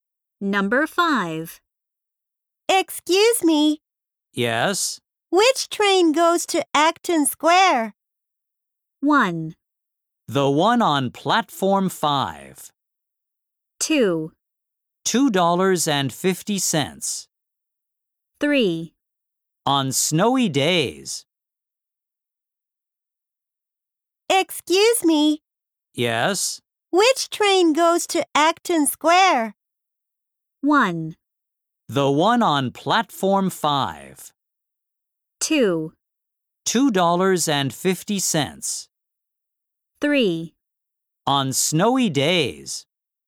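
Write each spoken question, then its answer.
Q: Which train goes to Acton Square?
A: 1: The one on Platform 5.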